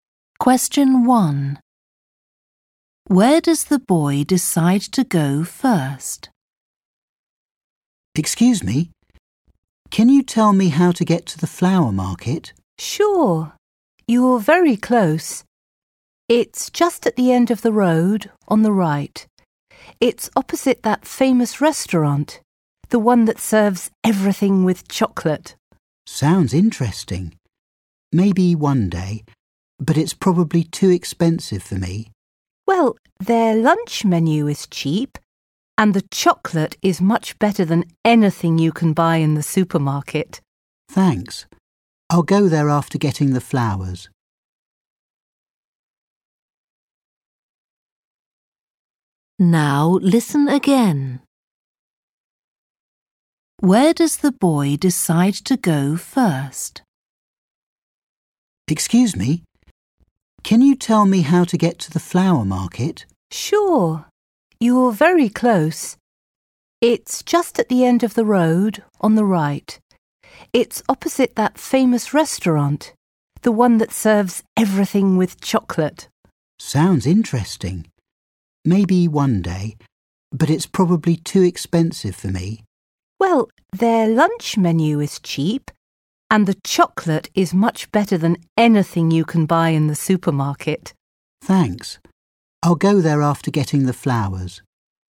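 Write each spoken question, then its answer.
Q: Where does the boy decide to go first?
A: The flower market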